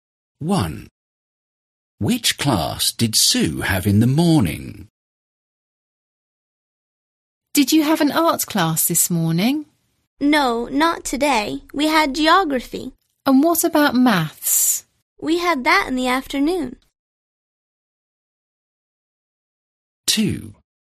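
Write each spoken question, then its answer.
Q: Which class did Sue have in the morning?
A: geography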